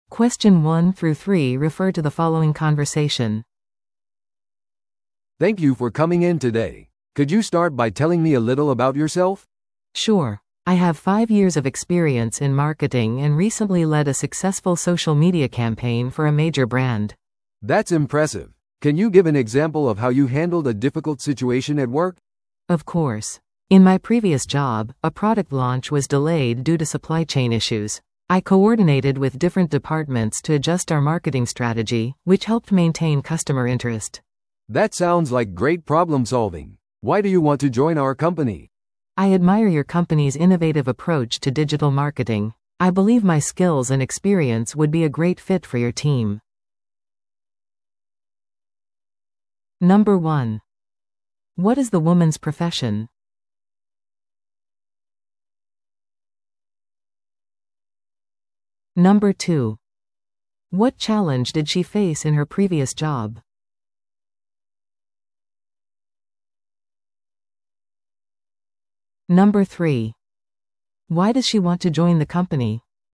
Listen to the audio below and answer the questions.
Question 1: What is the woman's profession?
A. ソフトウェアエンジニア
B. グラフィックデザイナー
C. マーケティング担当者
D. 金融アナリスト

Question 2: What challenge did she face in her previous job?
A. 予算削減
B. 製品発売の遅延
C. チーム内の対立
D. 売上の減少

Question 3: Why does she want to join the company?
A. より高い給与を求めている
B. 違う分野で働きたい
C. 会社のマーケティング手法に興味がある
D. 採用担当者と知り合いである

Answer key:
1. C
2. B
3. C

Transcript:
A: "Thank you for coming in today. Could you start by telling me a little about yourself?"
B: "Sure. I have five years of experience in marketing and recently led a successful social media campaign for a major brand."
A: "That's impressive. Can you give an example of how you handled a difficult situation at work?"
B: "Of course. In my previous job, a product launch was delayed due to supply chain issues. I coordinated with different departments to adjust our marketing strategy, which helped maintain customer interest."
A: "That sounds like great problem-solving. Why do you want to join our company?"
B: "I admire your company's innovative approach to digital marketing. I believe my skills and experience would be a great fit for your team."

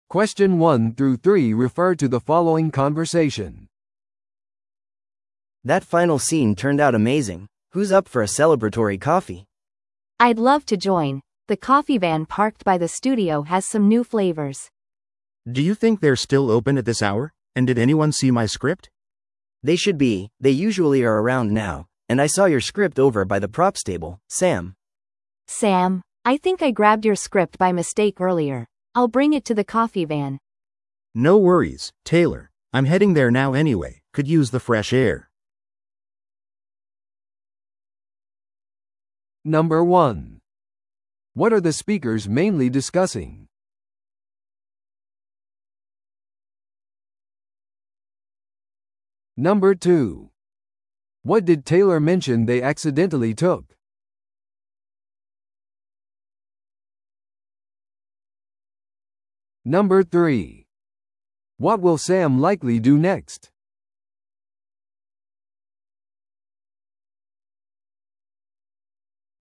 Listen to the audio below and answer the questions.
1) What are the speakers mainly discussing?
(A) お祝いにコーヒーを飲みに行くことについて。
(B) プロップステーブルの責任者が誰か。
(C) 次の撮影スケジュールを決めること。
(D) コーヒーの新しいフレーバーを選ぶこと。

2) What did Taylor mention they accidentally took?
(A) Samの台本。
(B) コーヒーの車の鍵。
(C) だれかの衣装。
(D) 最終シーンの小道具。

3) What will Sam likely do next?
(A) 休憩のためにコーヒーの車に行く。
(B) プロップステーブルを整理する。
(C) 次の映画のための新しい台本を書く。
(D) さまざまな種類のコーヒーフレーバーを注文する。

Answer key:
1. A
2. A
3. A

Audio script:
A: That final scene turned out amazing! Who's up for a celebratory coffee?
B: I'd love to join! The coffee van parked by the studio has some new flavors.
C: Do you think they're still open at this hour? And did anyone see my script?
A: They should be, they usually are around now. And I saw your script over by the props table, Sam.
B: Sam, I think I grabbed your script by mistake earlier. I'll bring it to the coffee van.
C: No worries, Taylor. I'm heading there now anyway, could use the fresh air.

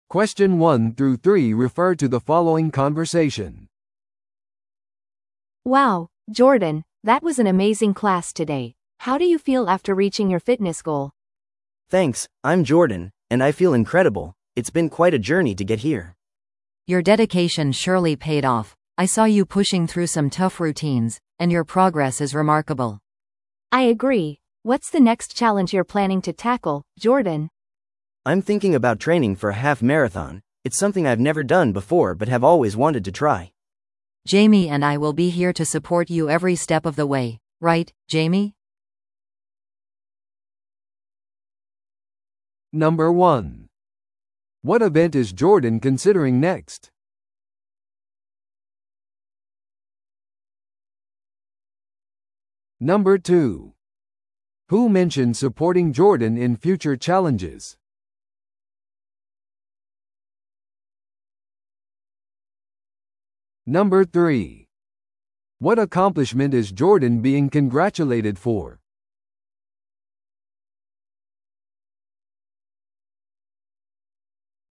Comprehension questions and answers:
Listen to the audio below and answer the questions.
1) What event is Jordan considering next?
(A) 自転車競技に参加する。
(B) ハーフマラソンのトレーニングをする。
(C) ウェイトリフティングプログラムを始める。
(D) フィットネスリトリートに行く。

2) Who mentioned supporting Jordan in future challenges?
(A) ジェイミーともう一人のインストラクター。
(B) 自己紹介した話者。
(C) 最初にジョーダンを祝福した話者。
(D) 他のフィットネスクラス参加者。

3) What accomplishment is Jordan being congratulated for?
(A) フィットネスコンペティションで優勝。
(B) 集中トレーニングコースを修了。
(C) 個人的なフィットネス目標を達成。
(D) クラス代表として選ばれる。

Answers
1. B
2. A
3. C

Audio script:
A: Wow, Jordan, that was an amazing class today! How do you feel after reaching your fitness goal?
B: Thanks, I'm Jordan, and I feel incredible! It's been quite a journey to get here.
C: Your dedication surely paid off. I saw you pushing through some tough routines, and your progress is remarkable.
A: I agree. What's the next challenge you're planning to tackle, Jordan?
B: I'm thinking about training for a half marathon. It's something I've never done before but have always wanted to try.
C: Jamie and I will be here to support you every step of the way. Right, Jamie?

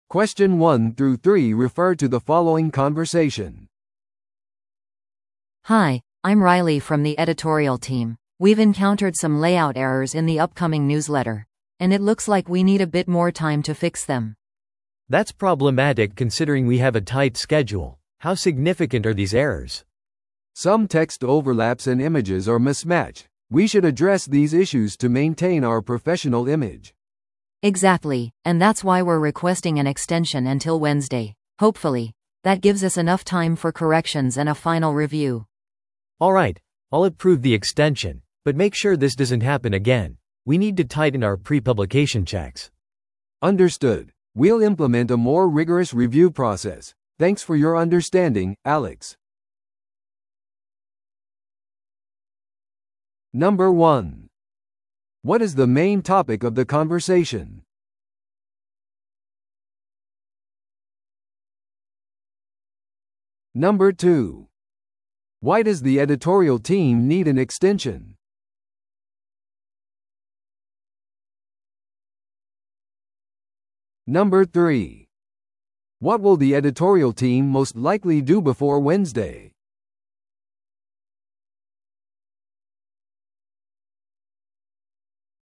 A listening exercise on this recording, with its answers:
Listen to the audio below and answer the questions.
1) What is the main topic of the conversation?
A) ニュースレターの内容改善。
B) ニュースレターの締め切り延長。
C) 新しい編集チームメンバーの紹介。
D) 編集チームの会議スケジューリング。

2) Why does the editorial team need an extension?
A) 彼らはニュースレターに記事を追加したいから。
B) 予定されていたプリンターのメンテナンスが生産を遅れさせた。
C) 修正する必要があるレイアウトのエラーがある。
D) ライリーが休暇に行くため、時間内に仕上げることができない。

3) What will the editorial team most likely do before Wednesday?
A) ニュースレターに新機能を追加する。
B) 最終確認を行い、訂正を行う。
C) 新しいスタッフにレイアウトソフトウェアの使用方法を教える。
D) 将来の問題についてアレックスと話し合うために会う。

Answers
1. B
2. C
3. B

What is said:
A: Hi, I'm Riley from the editorial team. We've encountered some layout errors in the upcoming newsletter, and it looks like we need a bit more time to fix them.
B: That's problematic considering we have a tight schedule. How significant are these errors?
C: Some text overlaps and images are mismatched. We should address these issues to maintain our professional image.
A: Exactly, and that's why we're requesting an extension until Wednesday. Hopefully, that gives us enough time for corrections and a final review.
B: Alright, I'll approve the extension. But make sure this doesn't happen again; we need to tighten our pre-publication checks.
C: Understood. We'll implement a more rigorous review process. Thanks for your understanding, Alex.

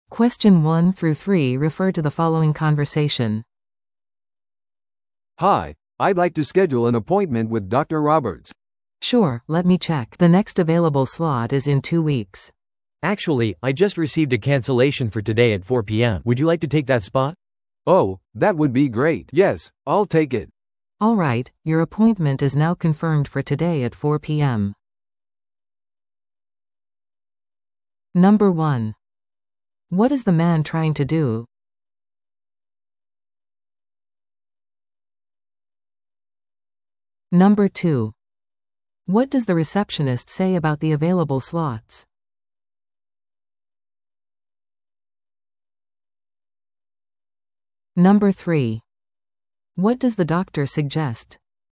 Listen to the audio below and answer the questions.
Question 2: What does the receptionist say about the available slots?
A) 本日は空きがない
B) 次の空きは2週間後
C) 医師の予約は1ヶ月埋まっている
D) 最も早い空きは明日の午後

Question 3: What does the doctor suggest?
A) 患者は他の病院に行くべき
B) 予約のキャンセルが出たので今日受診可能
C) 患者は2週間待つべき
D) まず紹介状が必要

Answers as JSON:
{"2": "B", "3": "B"}

